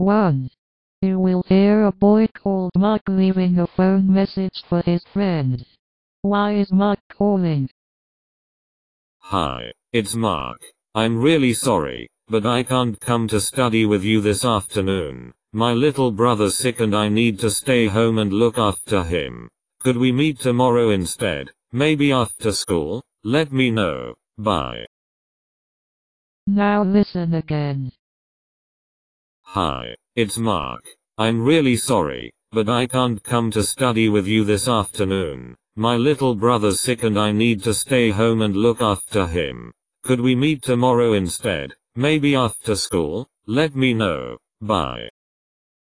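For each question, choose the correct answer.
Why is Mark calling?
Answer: He can't come to study this afternoon and wants to meet tomorrow instead

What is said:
You will hear a boy called Mark leaving a phone message for his friend.
ManHi, it's Mark.
I'm really sorry, but I can't come to study with you this afternoon — my little brother's sick and I need to stay home and look after him. Could we meet tomorrow instead, maybe after school? Let me know. Bye!

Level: KET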